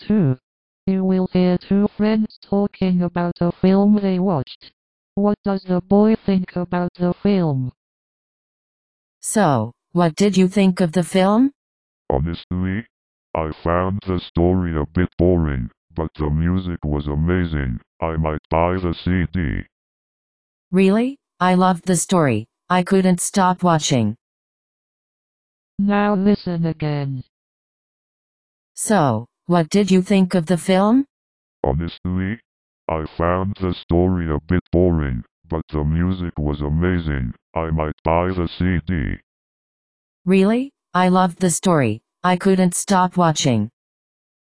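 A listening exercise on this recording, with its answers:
For each question, choose the correct answer.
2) What does the boy think about the film?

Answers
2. The story was boring but the music was amazing

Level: KET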